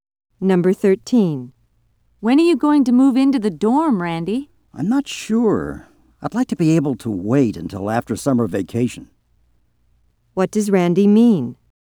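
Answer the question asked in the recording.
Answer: He'd prefer to move into the dorm after summer vacation.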